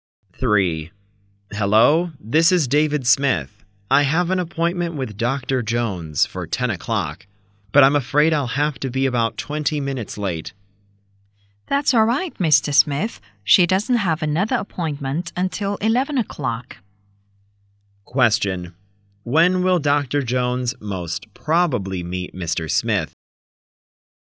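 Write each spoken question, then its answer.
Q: When will Dr. Jones most probably meet Mr. Smith?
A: At about 10:20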